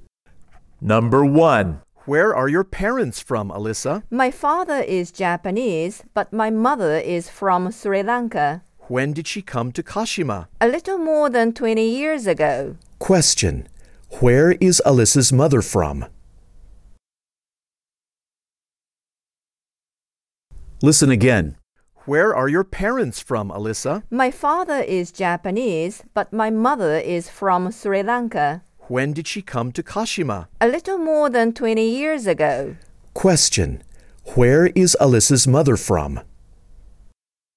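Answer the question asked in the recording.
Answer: Sri Lanka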